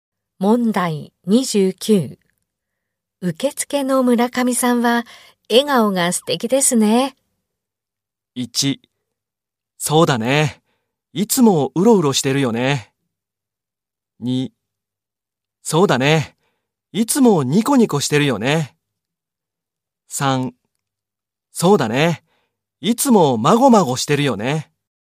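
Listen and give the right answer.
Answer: 2: そうだね。いつもニコニコしてるよね。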